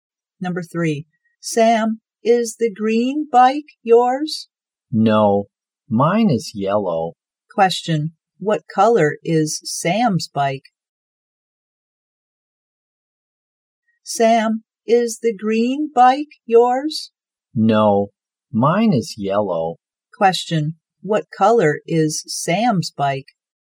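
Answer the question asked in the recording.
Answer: Yellow.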